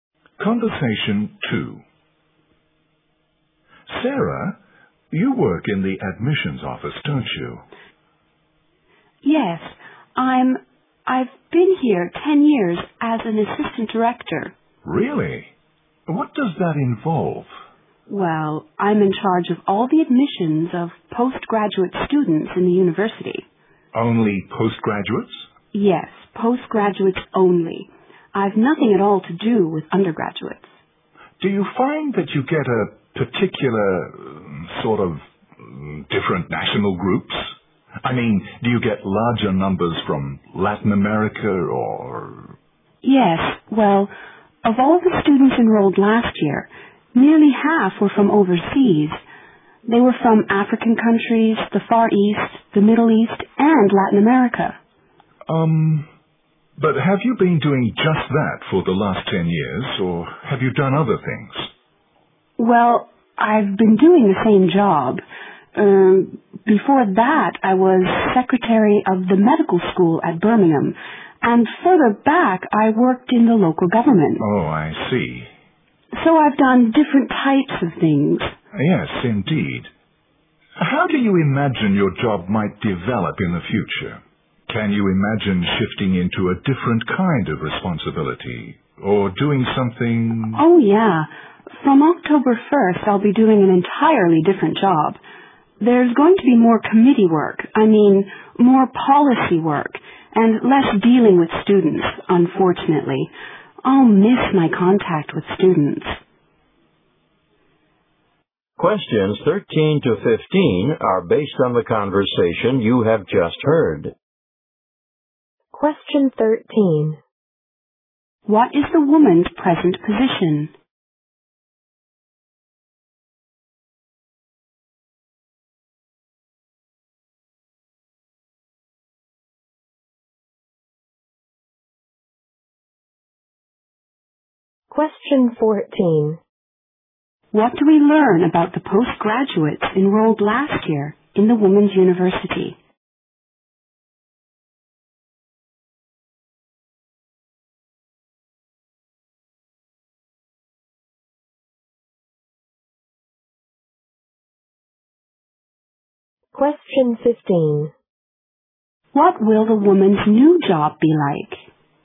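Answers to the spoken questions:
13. Assistant director of the admissions office
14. Nearly half were from overseas
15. More committee and policy work, less dealing with students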